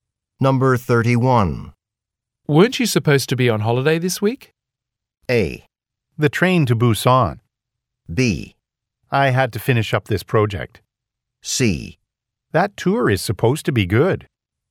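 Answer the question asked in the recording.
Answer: B: I had to finish up this project.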